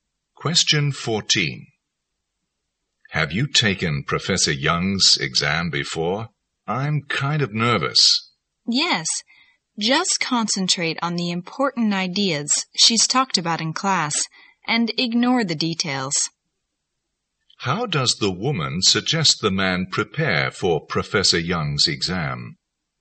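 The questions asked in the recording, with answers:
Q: How does the woman suggest the man prepare for Professor Young's exam?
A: Concentrate on the important ideas discussed in class and ignore details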